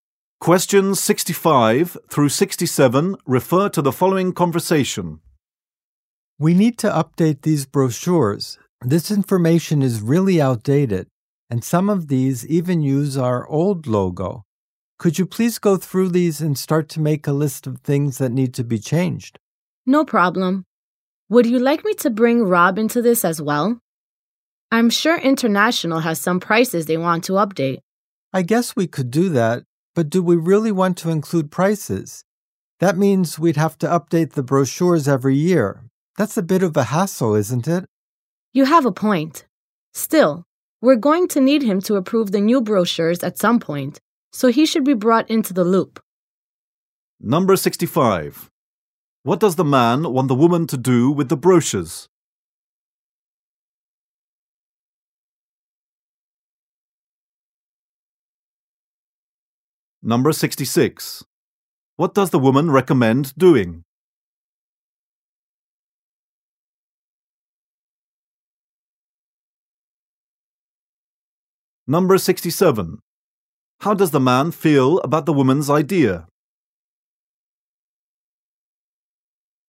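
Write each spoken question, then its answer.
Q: What does the man want the woman to do with the brochures?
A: Make a list of things that need to be changed

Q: What does the woman recommend doing?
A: Bringing Rob into the project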